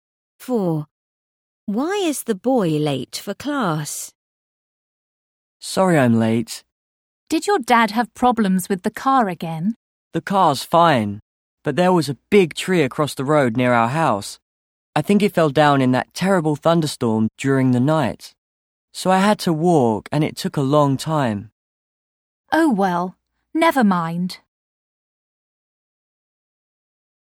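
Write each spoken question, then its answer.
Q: Why is the boy late for class?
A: A tree fell across the road, so he had to walk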